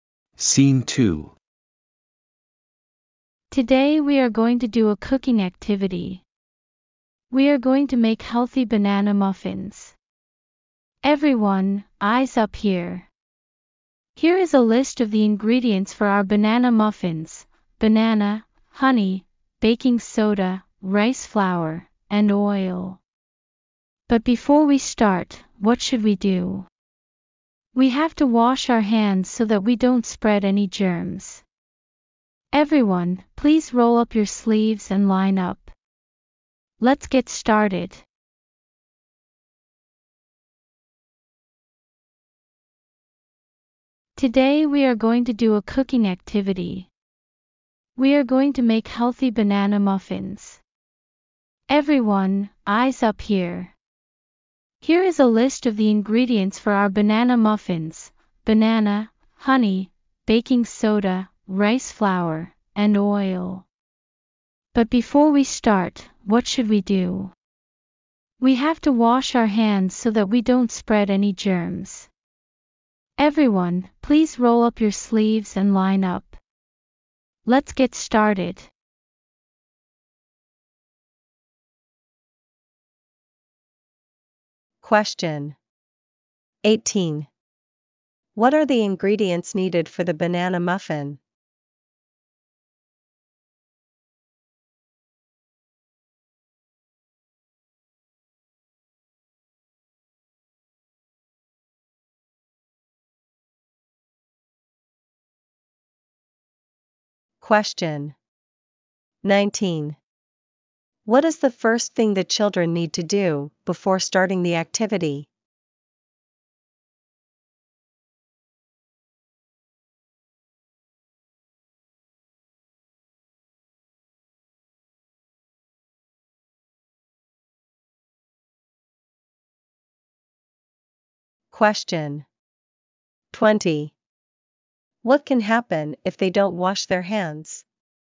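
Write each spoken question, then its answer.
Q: What are the ingredients needed for the banana muffin?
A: Banana, honey, baking soda, rice flour, and oil

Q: What is the first thing the children need to do before starting the activity?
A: Wash their hands

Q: What can happen if they don't wash their hands?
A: They may spread germs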